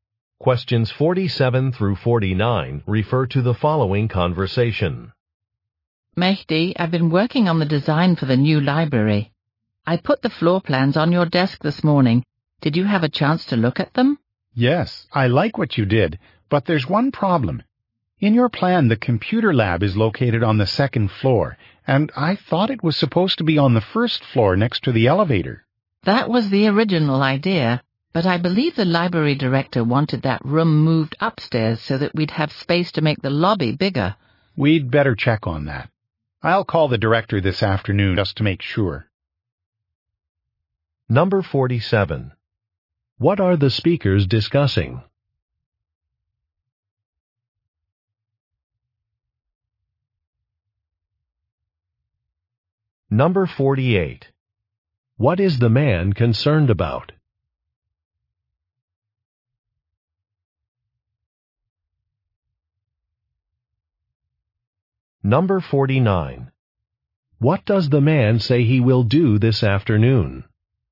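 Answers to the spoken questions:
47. Floor plans for a new library
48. The location of the computer lab
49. Call the library director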